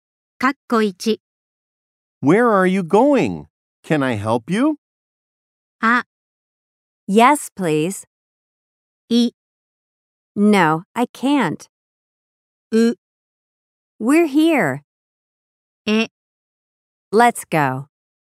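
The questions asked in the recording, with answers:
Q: Where are you going? Can I help you?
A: あ: Yes, please.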